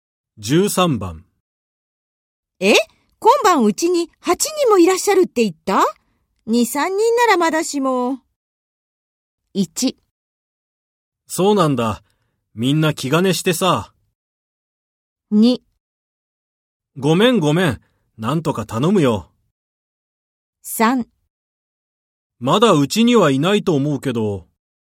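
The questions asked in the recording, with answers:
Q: え?今晩うちに8人もいらっしゃるって言った? 2、3人ならまだしも。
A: 2: ごめんごめん。なんとか頼むよ。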